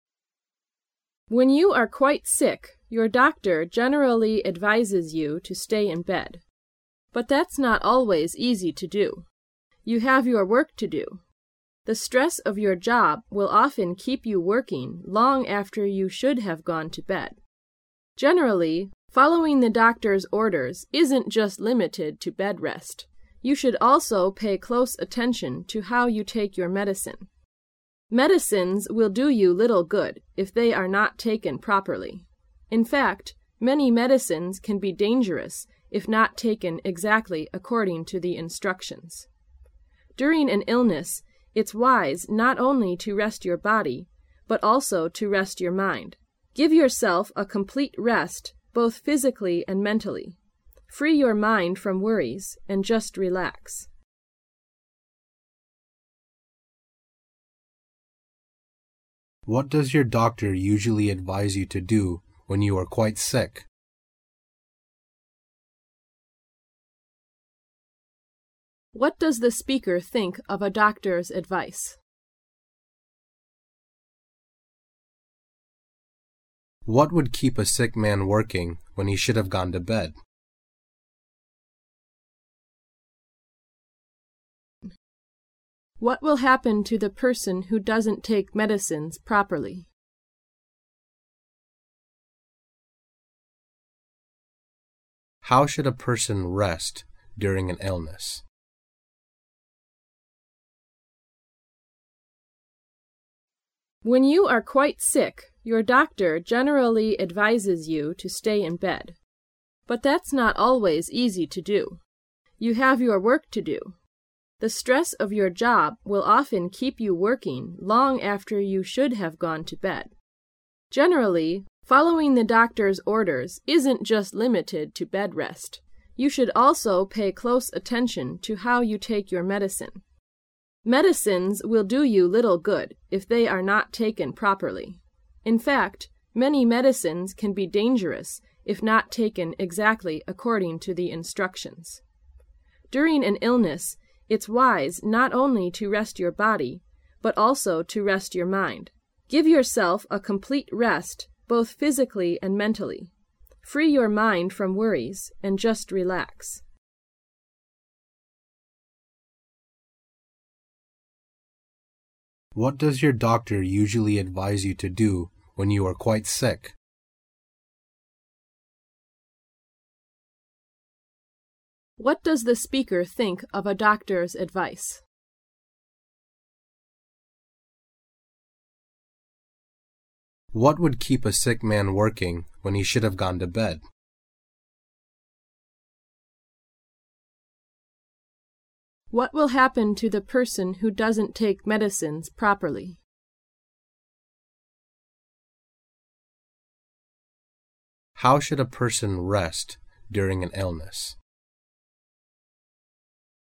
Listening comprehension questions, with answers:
Section C Directions: This section is to test your ability to comprehend short passages. You will hear a recorded passage. After that you will hear five questions. Both the passage and the questions will be read two times. When you hear a question, you should complete the answer to it with a word or a short phrase (in not more than 3 words). The questions and incomplete answers are printed in your test paper. You should write your answer on the Answer Sheet correspondingly. Now listen to the passage.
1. What does your doctor usually advise you to do when you're quite sick? To ____________________.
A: stay in bed

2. What does the speaker think of following a doctor's advice? Following a doctor's advice is not always ____________________.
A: easy to do

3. What will keep a sick man working when he should have gone to bed? The stress of his ____________________.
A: job

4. What will happen to the person who doesn't take medicines properly? The medicines will do the person ____________________.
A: little good

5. How should a person rest during an illness? He should rest both his body and ____________________.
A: mind

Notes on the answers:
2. 由关键句"Generally,following the doctor's order is not always easy to do."可知,病人一般不容易听从医生的劝告。
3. 由关键句"It's the stress of your job for often keeping you working long after you should have gone to bed"可知,工作(job)的压力使得你长时间地干活。
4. 由关键句"Medicines will do you little good if they are not taken properly"可知,如果不正确服药,药物将对你的身体没什么好处。
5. 一个人生病了的时候,该怎样休息呢?由关键句"During an illness,it's not only to rest your body,but also to rest your mind."可知,一个人生病了的时候,既要休息好身体,又要休息好大脑。

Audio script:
[解析] 11-15 When you are quite sick; your doctor generally advises you to stay in bed. But that's not always easy to do so. You have your work to do. The stress of your job will often keep you working long after you should have gone to bed. Generally, following the doctor's orders is just limited to bed rest. You should also pay close attention to how you take your medicine. Medicines will do you little good, if they are not taken properly. In fact, many medicines can be dangerous if not taken exactly according to the instructions. During an illness, it's wise not only to rest your body, but also to rest your mind. Give yourself a completely rest both physically and mentally. Free your mind from worries and just relax. What does your doctor usually advise you to do when you are quite sick?